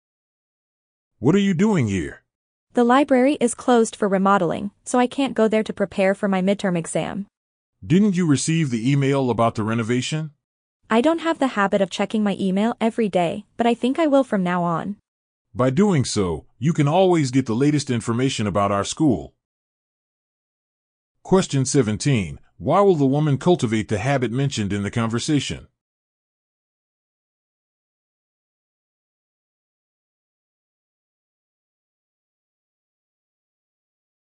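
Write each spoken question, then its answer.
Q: Why will the woman cultivate the habit mentioned in the conversation?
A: Because she missed the email about the library renovation; checking email daily will keep her updated with the latest school information.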